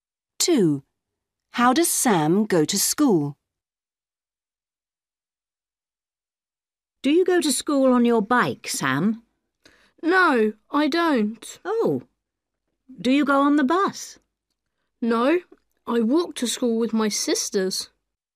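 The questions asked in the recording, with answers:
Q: How does Sam go to school?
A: He walks to school with his sisters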